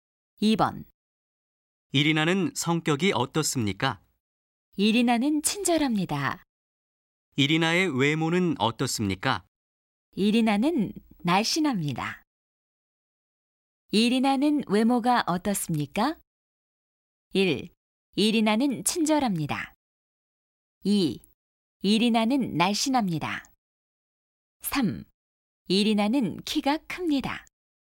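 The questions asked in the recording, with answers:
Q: 이리나는 외모가 어떻습니까?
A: 2: 이리나는 날씬합니다.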